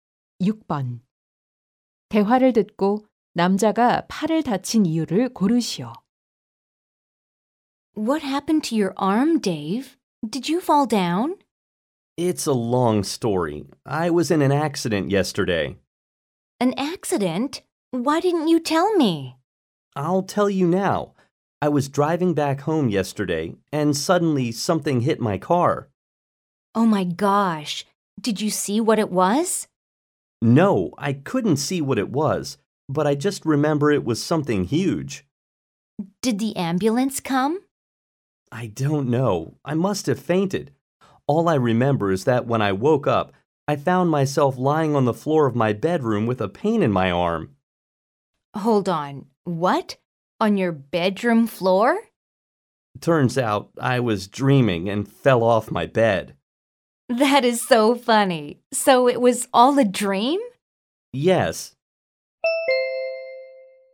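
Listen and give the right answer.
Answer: 꿈을 꾸다가 침대에서 떨어져서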